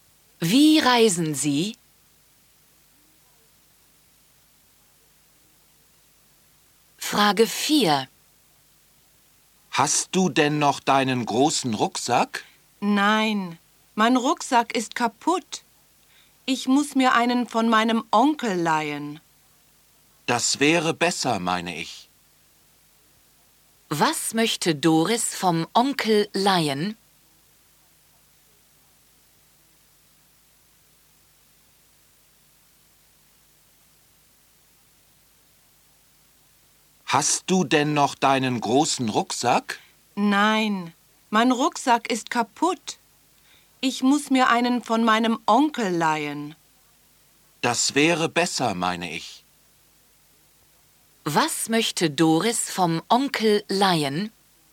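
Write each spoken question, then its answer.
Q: Was möchte Doris vom Onkel leihen?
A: Einen Rucksack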